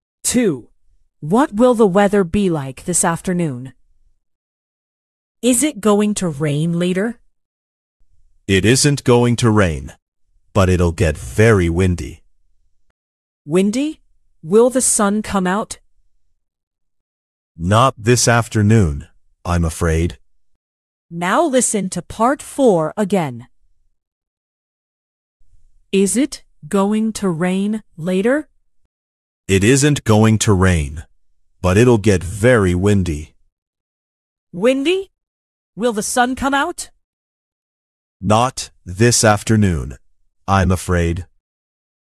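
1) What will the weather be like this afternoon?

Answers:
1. very windy, no rain and no sun

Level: 劍橋兒童英檢 Flyers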